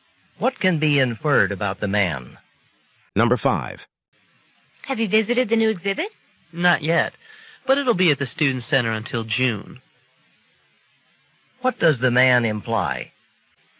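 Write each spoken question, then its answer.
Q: What does the man imply?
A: He plans to see the exhibit later, before June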